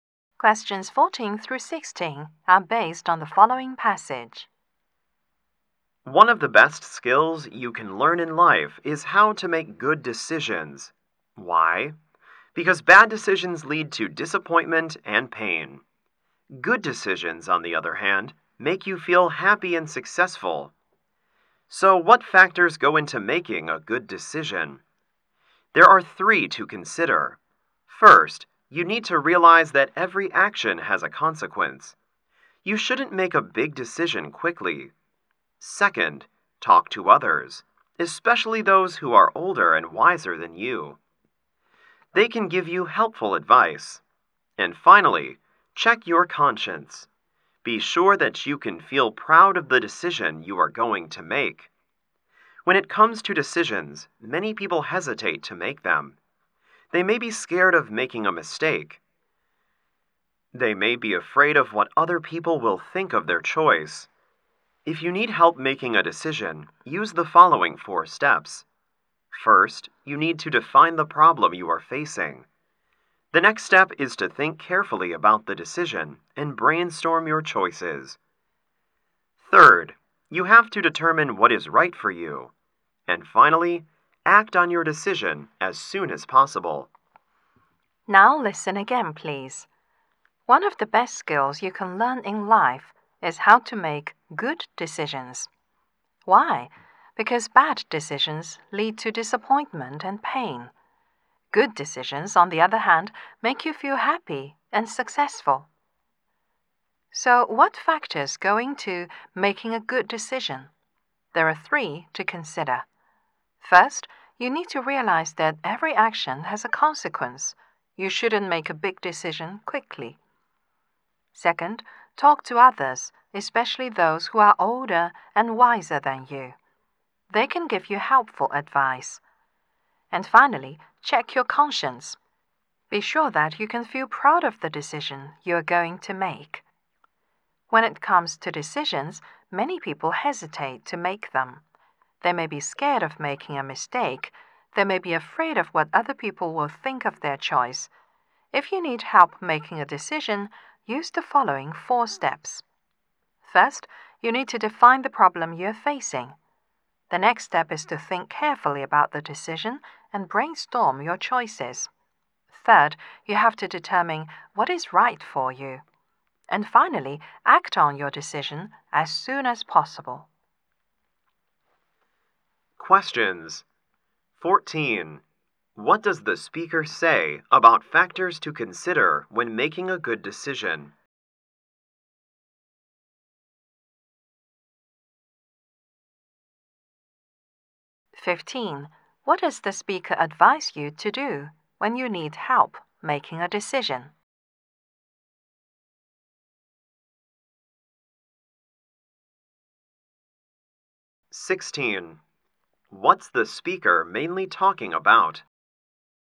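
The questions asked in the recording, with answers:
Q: What does the speaker say about factors to consider when making a good decision?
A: Realize consequences, talk to older and wiser people, check your conscience

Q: What does the speaker advise you to do when you need help making a decision?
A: Follow four steps: define the problem, brainstorm choices, determine what's right, act quickly

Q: What's the speaker mainly talking about?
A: How to make good decisions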